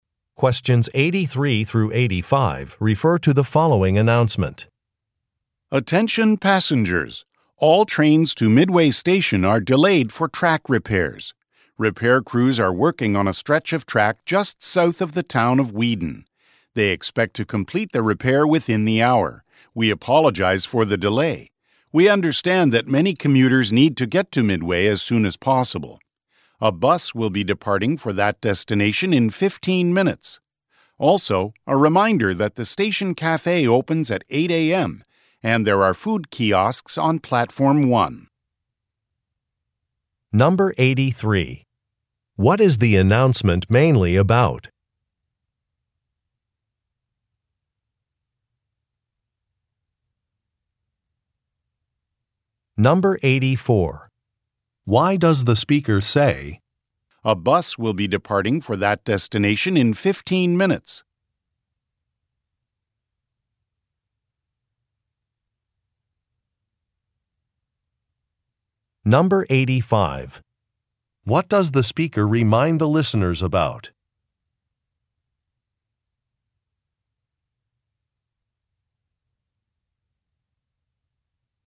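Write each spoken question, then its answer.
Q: What is the announcement mainly about?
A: Trains to Midway Station are delayed because of track repairs

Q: Why does the speaker say, "A bus will be departing for that destination in 15 minutes"?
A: To offer commuters another way to get to Midway

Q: What does the speaker remind the listeners about?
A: Food options: the station cafe opens at 8 a.m. and there are food kiosks on Platform 1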